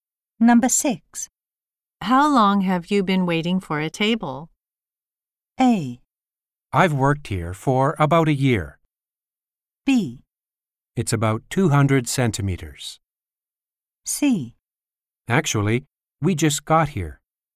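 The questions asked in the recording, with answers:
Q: How long have you been waiting for a table?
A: C: Actually, we just got here.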